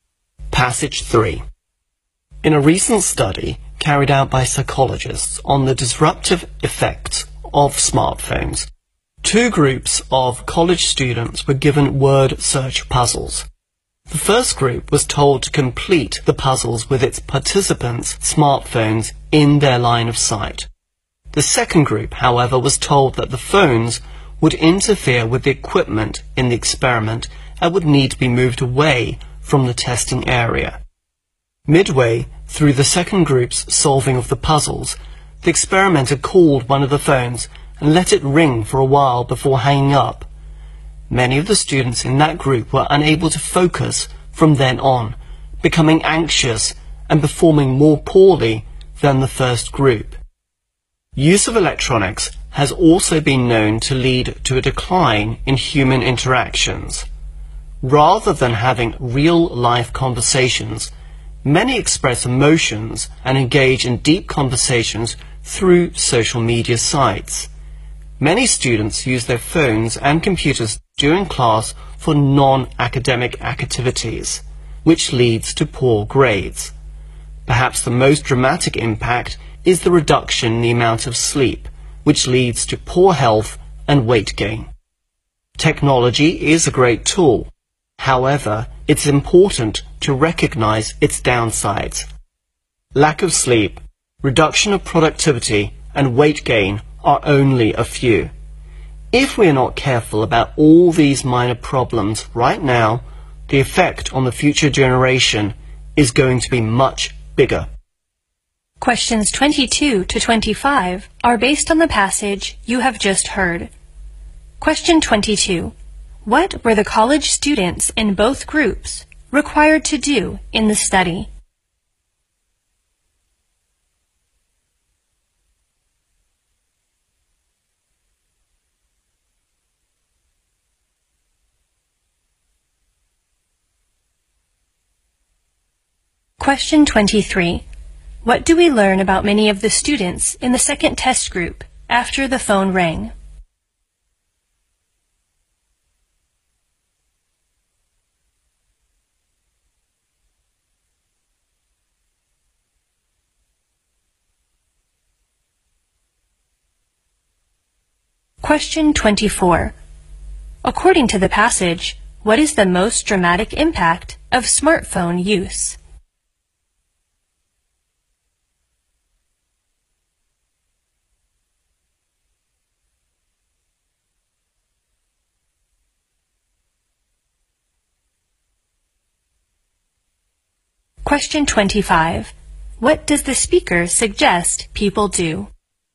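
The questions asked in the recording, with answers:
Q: What were the college students in both groups required to do in the study?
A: Complete word search puzzles

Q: What do we learn about many of the students in the second test group after the phone rang?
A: They couldn't focus, became anxious and performed worse

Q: According to the passage, what is the most dramatic impact of smartphone use?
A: Reduced sleep

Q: What does the speaker suggest people do?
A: Recognize technology's downsides and be careful about them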